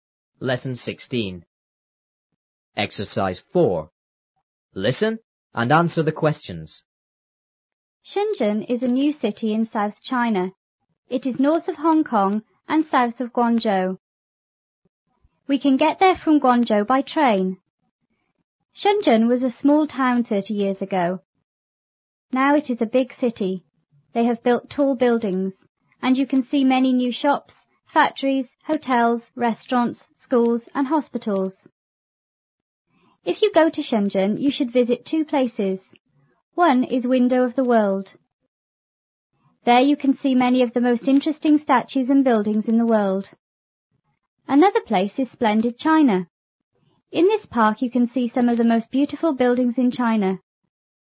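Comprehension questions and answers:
4.Listen and answer the questions.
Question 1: Where is Shenzhen?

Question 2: Was Shenzhen a big city in 1960?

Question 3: Write the names of two kinds of new buildings in Shenzhen.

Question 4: What can you see at Window of the World in Shenzhen?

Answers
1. In South China, north of Hong Kong and south of Guangzhou.
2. No, it was a small town.
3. Shops and hotels (also factories, restaurants, schools, hospitals).
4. Many of the most interesting statues and buildings in the world.

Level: 初中英语广州版3B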